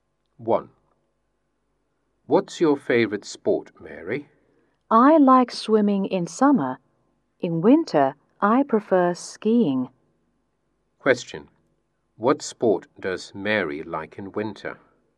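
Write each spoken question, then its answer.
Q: What sport does Mary like in winter?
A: Skiing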